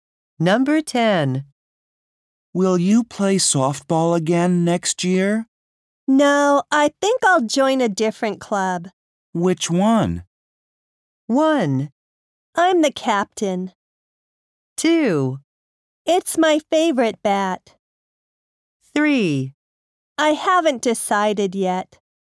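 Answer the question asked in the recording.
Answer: 3: I haven't decided yet.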